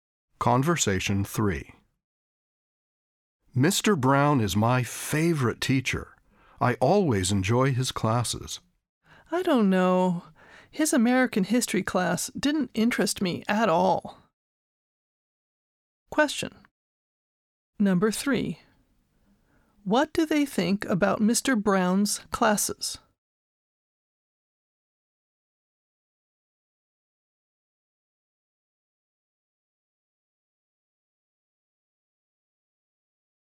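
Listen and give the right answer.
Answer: They have different opinions: one enjoys them, the other did not find them interesting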